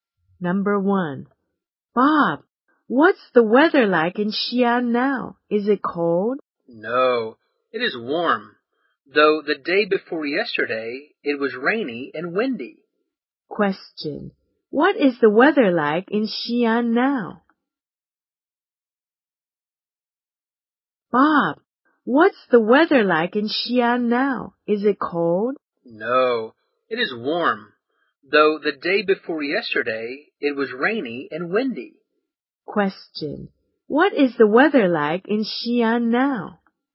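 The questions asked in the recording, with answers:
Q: what is the weather like in Xi'an now?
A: Warm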